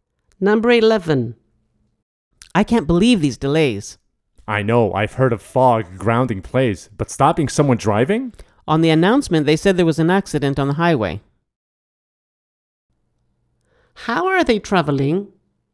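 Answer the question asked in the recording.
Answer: By car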